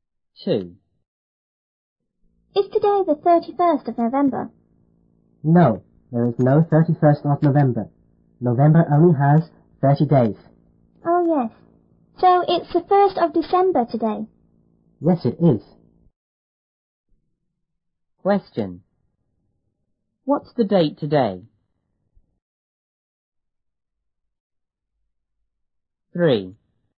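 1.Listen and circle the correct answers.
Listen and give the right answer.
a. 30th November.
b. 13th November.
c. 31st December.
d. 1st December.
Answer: d. 1st December.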